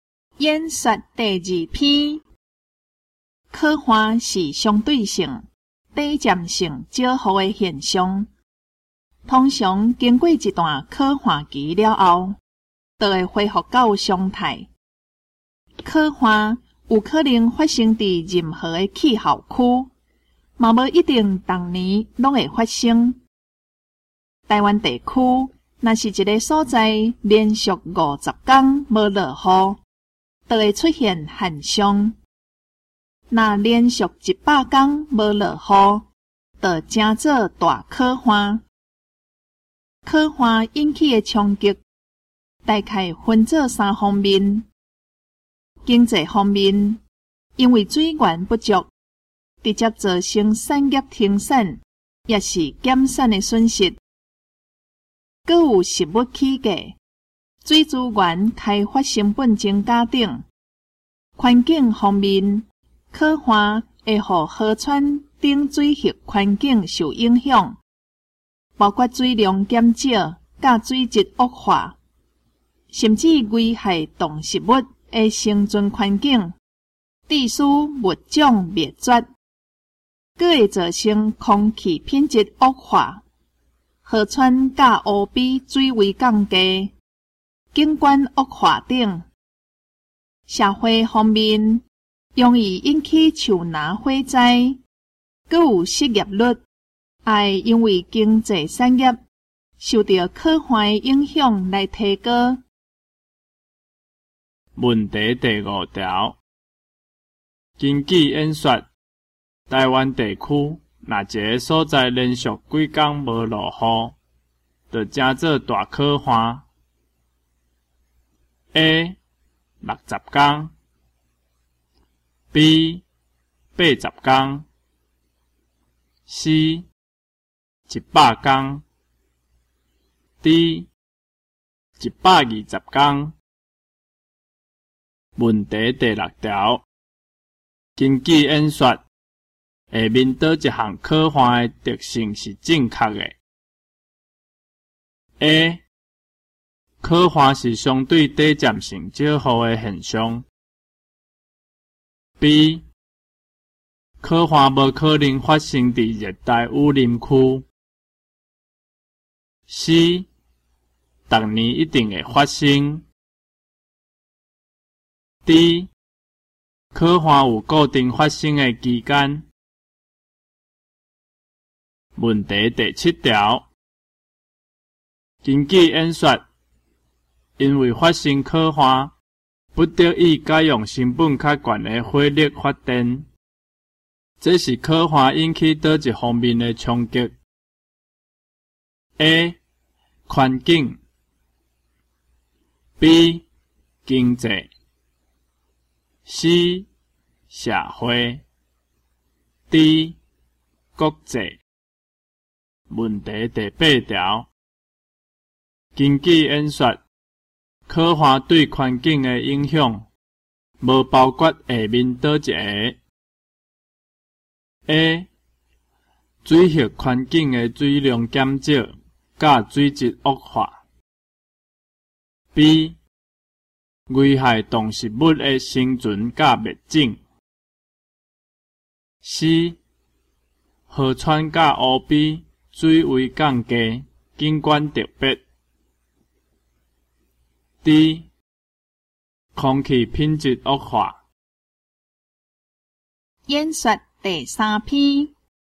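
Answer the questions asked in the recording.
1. C: 100天
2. A: 刻画是相对短暂性较好的现象
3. B: 经济
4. C: 河川甲湖边水位降低,景观特别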